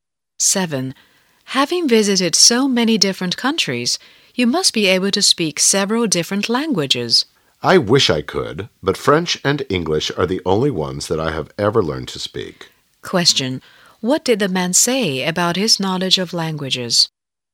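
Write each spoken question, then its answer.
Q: Question. What did the man say about his knowledge of languages?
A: He can speak only French and English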